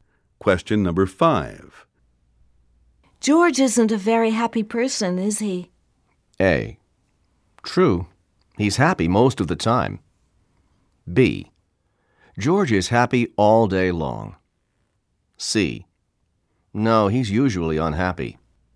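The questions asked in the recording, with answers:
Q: George isn't a very happy person, is he?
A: C: No, he's usually unhappy.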